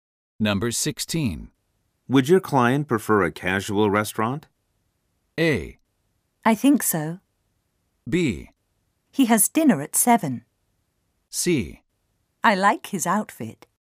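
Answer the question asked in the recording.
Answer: A: I think so.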